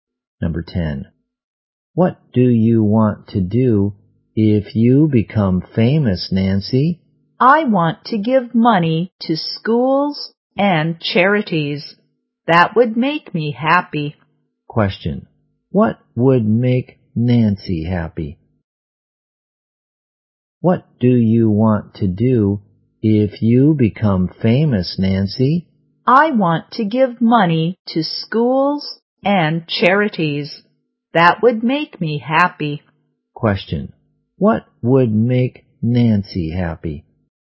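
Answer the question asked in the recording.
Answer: Giving money to schools and charities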